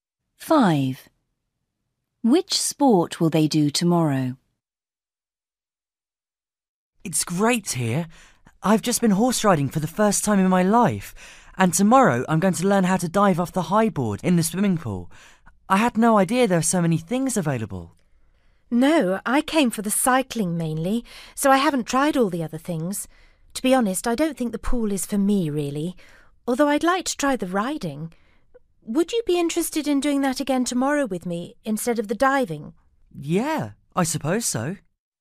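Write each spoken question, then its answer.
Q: Which sport will they do tomorrow?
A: horse riding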